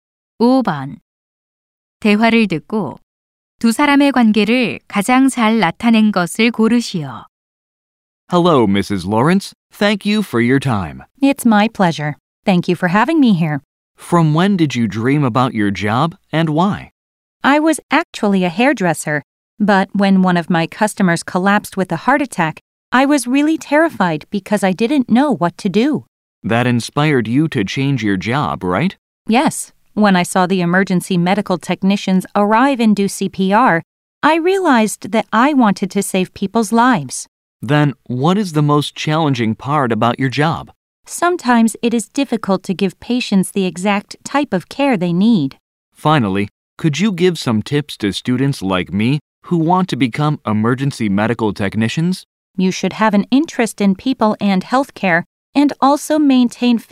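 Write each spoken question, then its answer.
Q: 대화를 듣고 두 사람의 관계를 가장 잘 나타낸 것을 고르시오.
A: 응급 구조사와 그 직업을 꿈꾸는 학생(인터뷰어)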